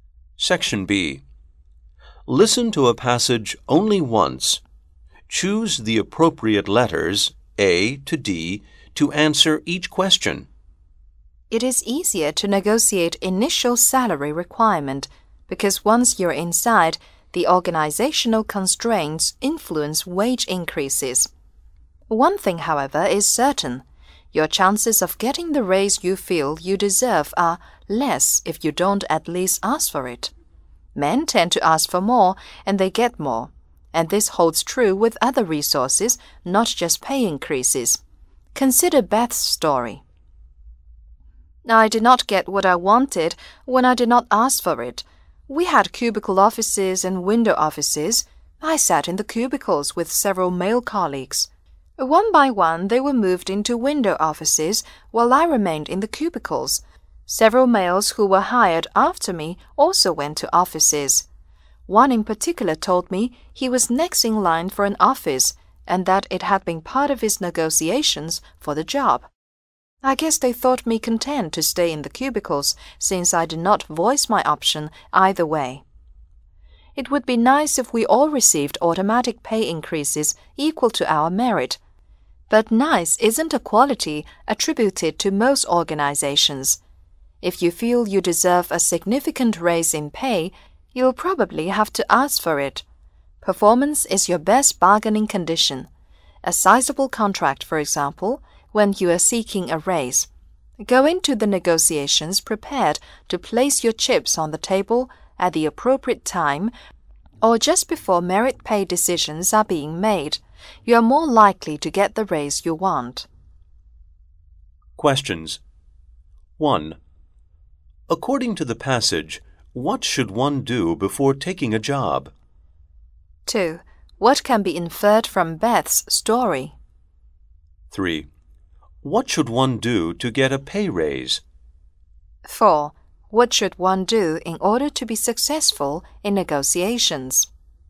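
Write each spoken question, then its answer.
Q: According to the passage, what should one do before taking a job?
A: Negotiate the starting salary

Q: What can be inferred from Beth's story?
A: If you don't ask for something, you won't get it

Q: What should one do to get a pay raise?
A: Ask for it, using good performance as bargaining power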